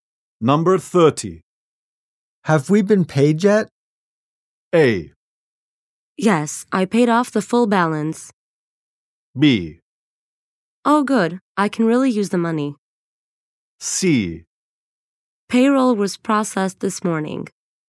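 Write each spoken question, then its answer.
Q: Have we been paid yet?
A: C: Payroll was processed this morning.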